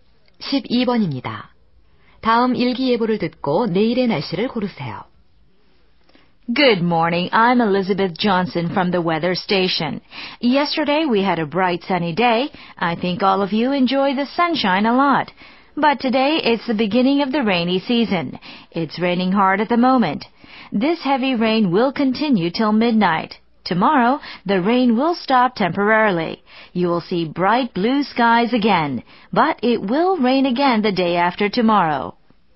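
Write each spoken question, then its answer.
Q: 다음 일기 예보를 듣고 내일의 날씨를 고르세요.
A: 맑음 (비가 그치고 파란 하늘)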